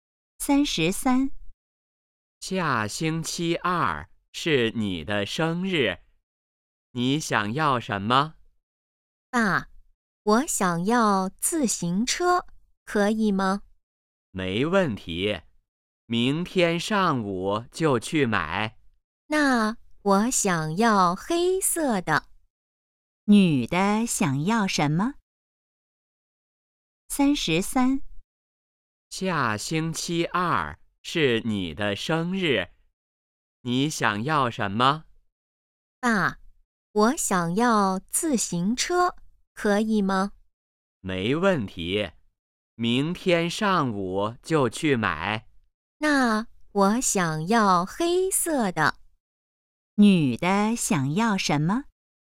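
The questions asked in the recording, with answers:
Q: 女的想要什么?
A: 黑色的自行车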